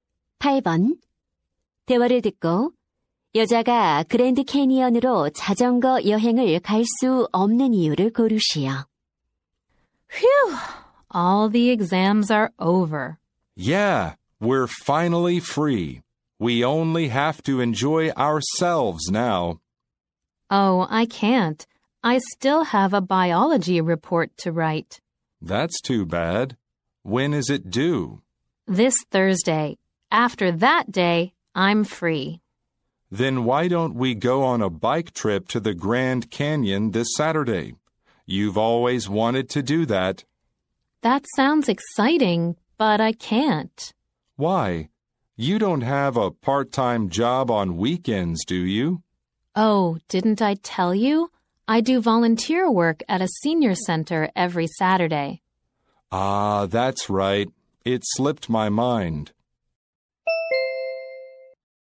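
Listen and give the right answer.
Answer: 매주 토요일 노인 센터에서 자원봉사를 해서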